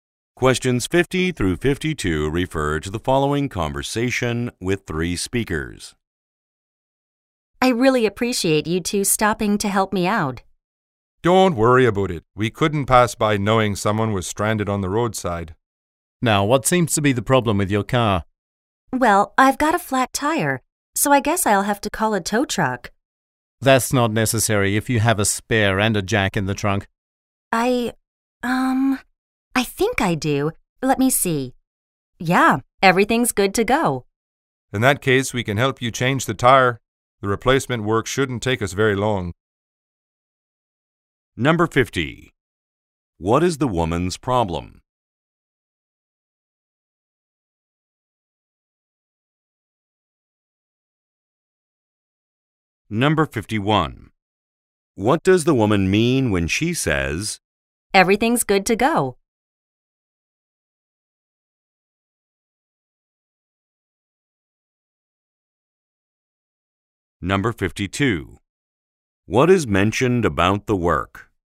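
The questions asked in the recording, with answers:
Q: What is the woman's problem?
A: She has a flat tire.

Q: What does the woman mean when she says, "Everything's good to go"?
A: She has a spare tire and a jack in the trunk.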